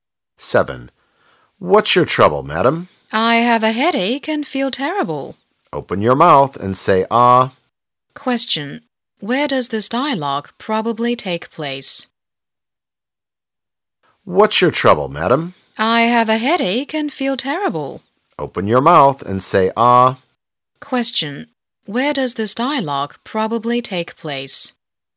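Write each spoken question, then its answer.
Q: Where does this dialogue probably take place?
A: In a hospital (doctor's office)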